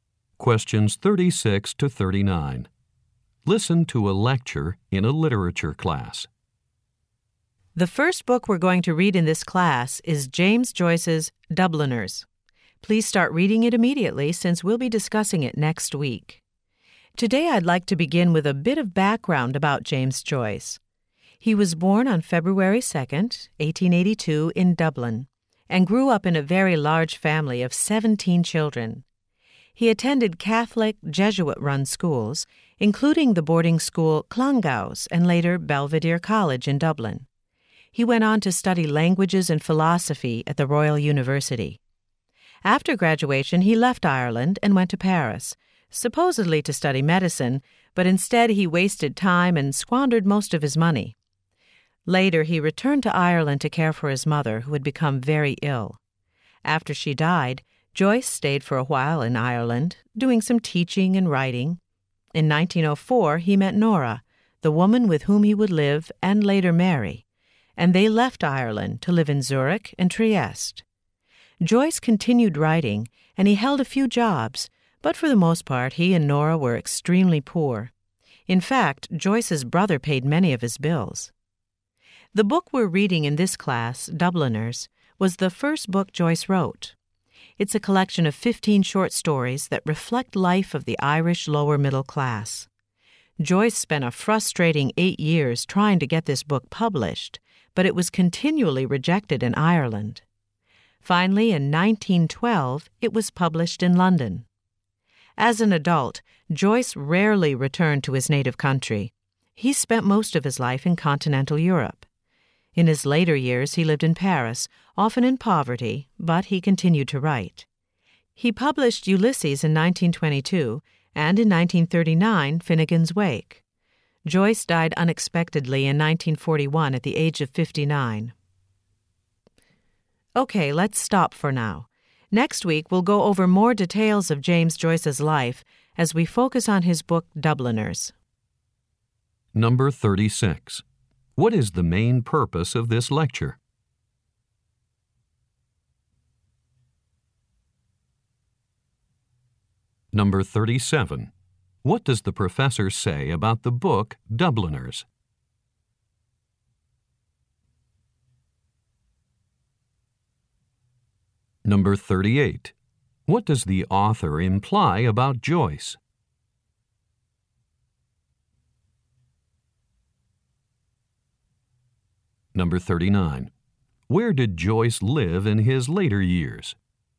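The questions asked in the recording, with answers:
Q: What is the main purpose of this lecture?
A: To give background on the life of James Joyce

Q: Where did Joyce live in his later years?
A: In Paris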